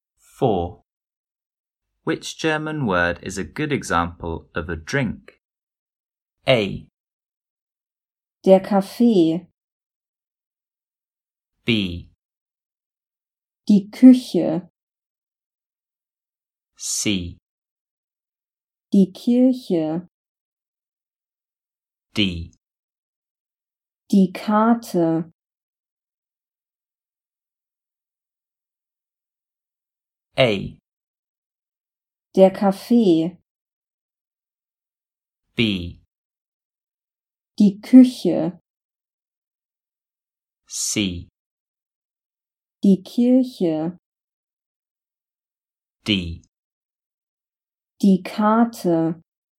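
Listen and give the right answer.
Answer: A: Der Kaffee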